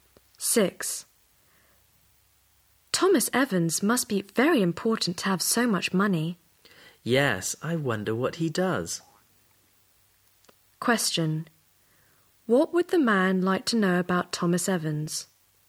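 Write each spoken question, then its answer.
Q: What would the man like to know about Thomas Evans?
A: His job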